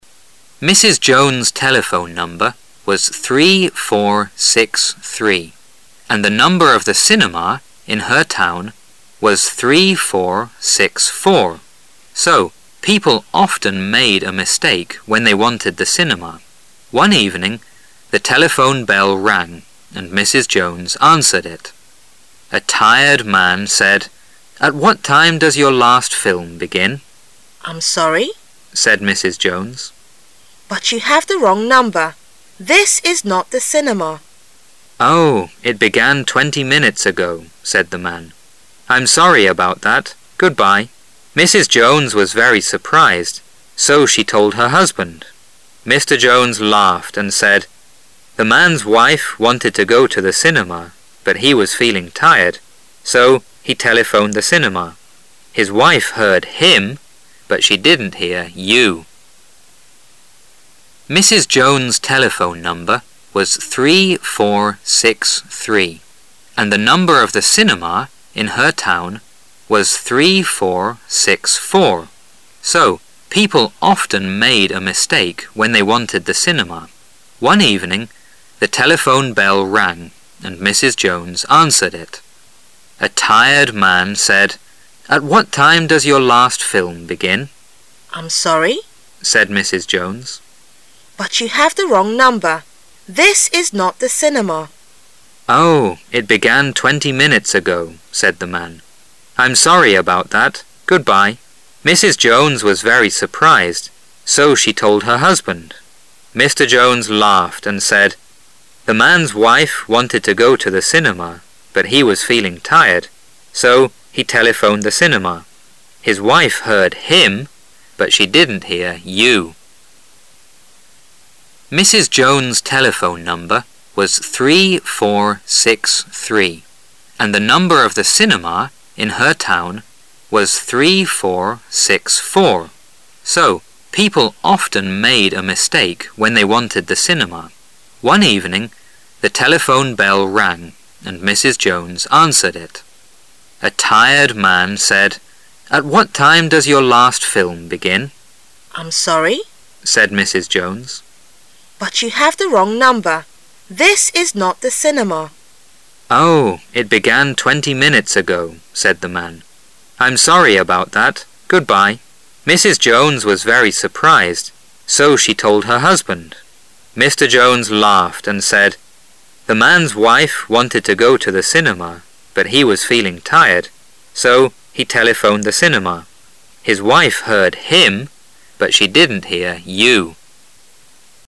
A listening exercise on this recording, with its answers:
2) One evening the telephone bell 2 and Mrs Jones answered it.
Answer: rang

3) "At what time does your 3 begin?"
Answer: last film

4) "Oh, it began 4 ago. "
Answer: twenty minutes

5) Mrs Jones was very 5 , so she told her husband.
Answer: surprised

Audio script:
Now the passage will begin Mrs Jones' telephone number was 3463, and the number of the cinema in her town was 1 , so people often made a mistake when they wanted the cinema.
[解析] 11-15 Mrs Jones' telephone number was 3463, and the number of the cinema in her town was 3464, so people often made a mistake when they wanted the cinema. One evening the telephone bell rang and Mrs Jones answered it. A tired man said , "At what time does your last film begin?" "I'm sorry," said Mrs Jones, "but you have the wrong number. This is not the cinema. " "Oh, it began twenty minutes ago." said the man. "I'm sorry about that. Goodbye. " Mrs Jones was very surprised, so she told her husband. Mr Jones laughed and said, "The man's wife wanted to go to the cinema, but he was feeling tired, so he telephoned the cinema. His wife heard HIM, but she didn't hear YOU.